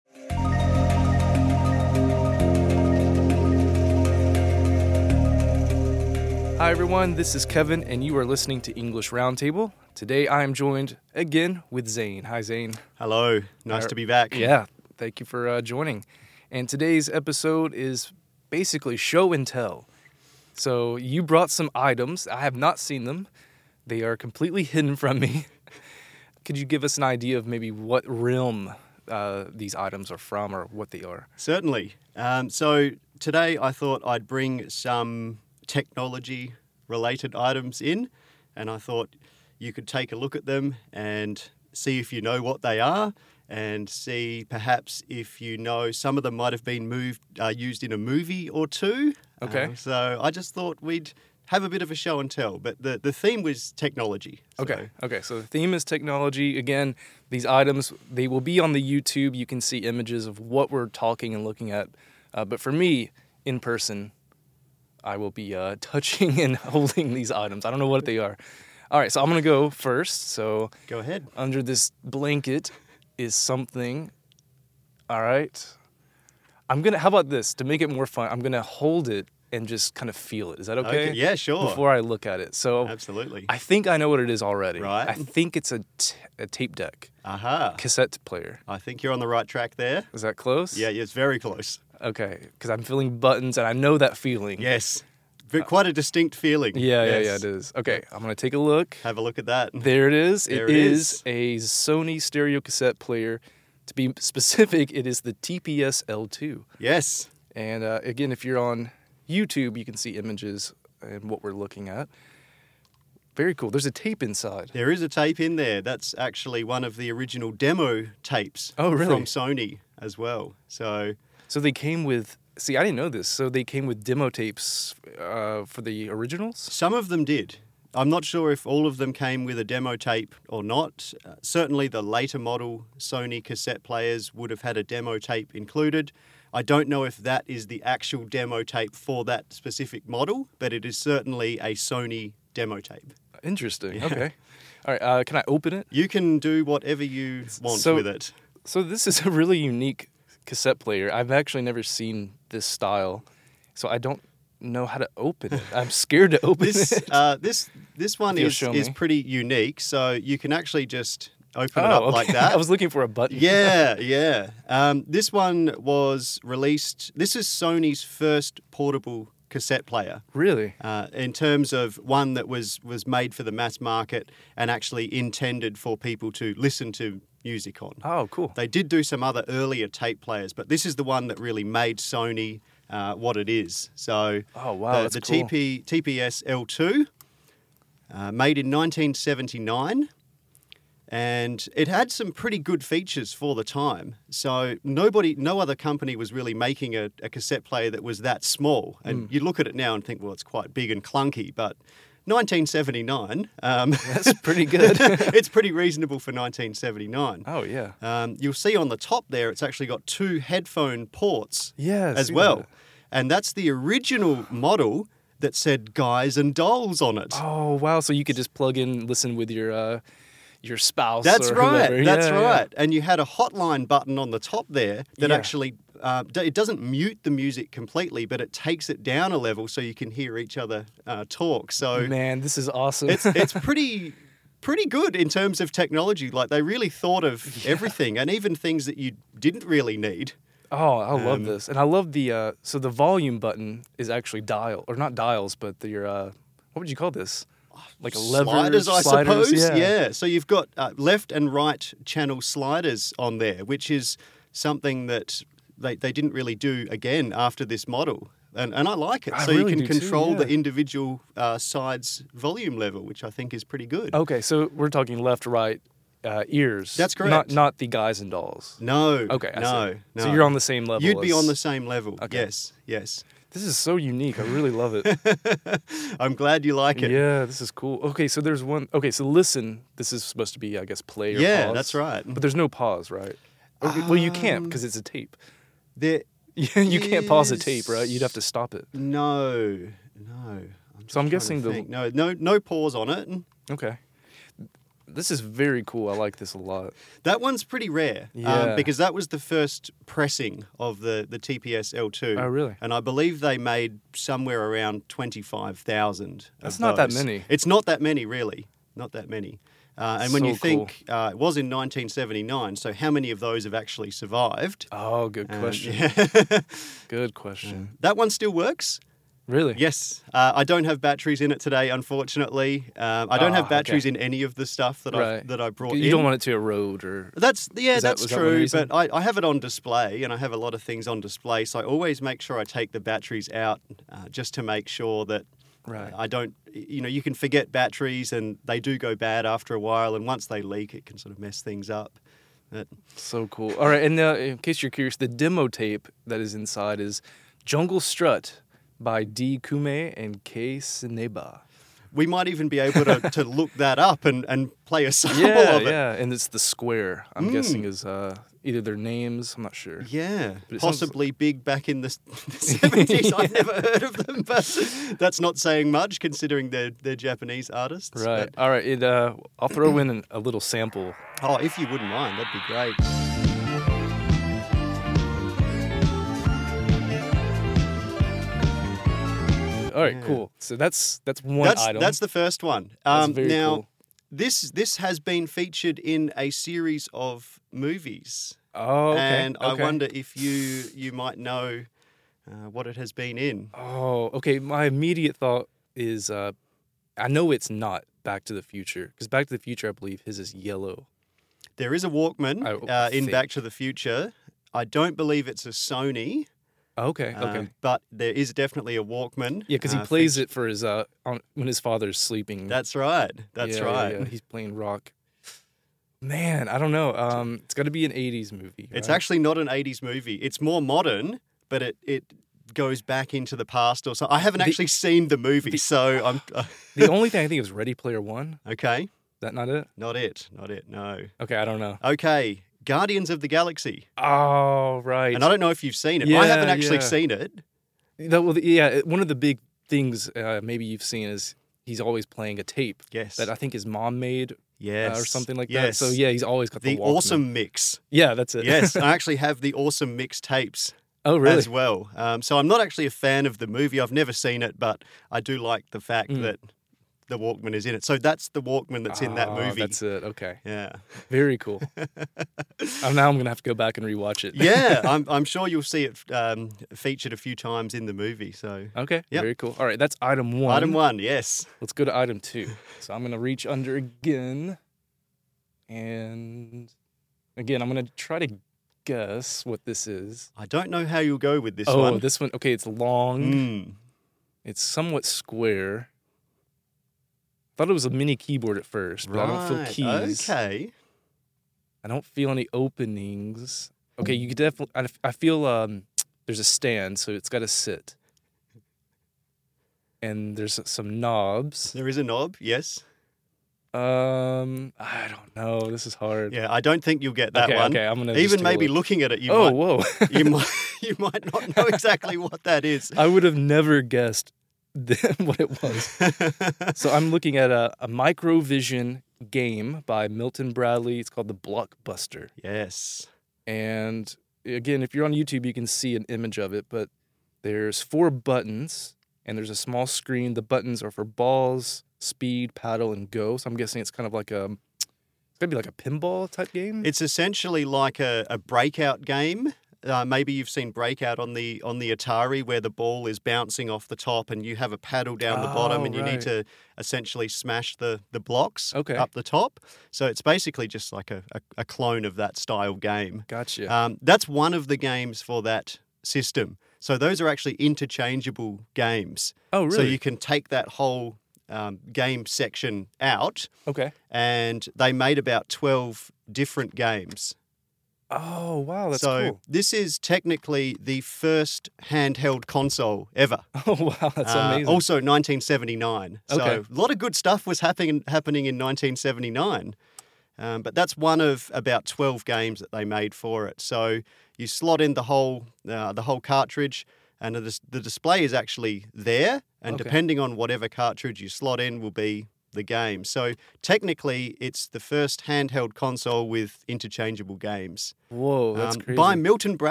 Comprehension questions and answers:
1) What is the first item that Kevin and Zane discuss?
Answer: SONY Walkman (TPS-L2)